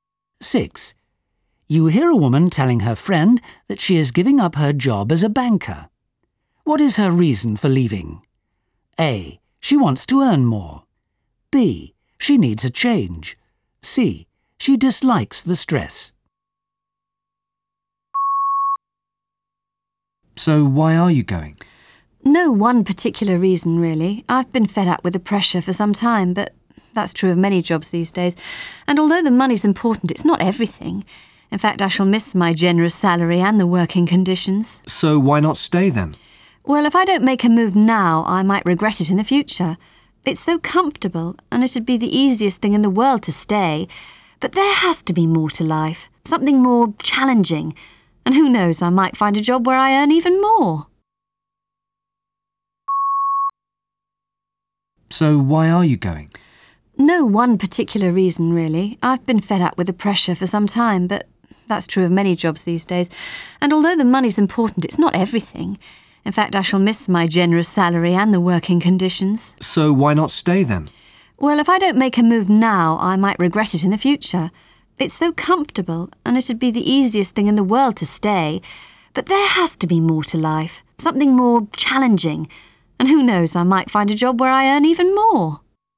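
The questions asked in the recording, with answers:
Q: What is her reason for leaving? A. She wants to earn more. B. She needs a change. C. She dislikes the stress.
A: B: She needs a change.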